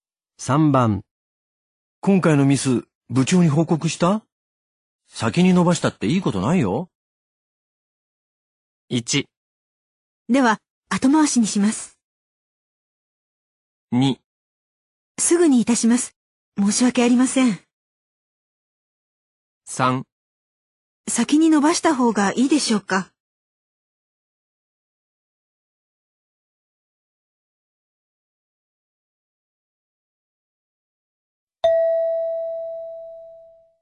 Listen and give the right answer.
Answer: 2

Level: N2 Listening · Test 12